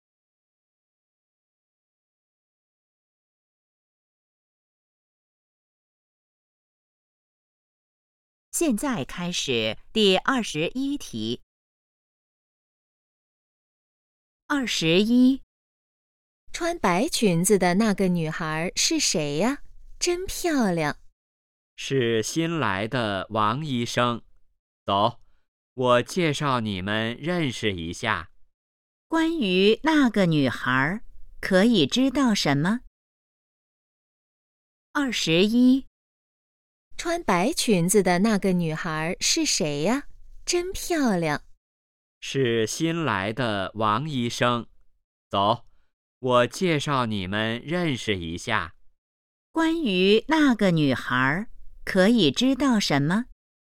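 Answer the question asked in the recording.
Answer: 她是新来的医生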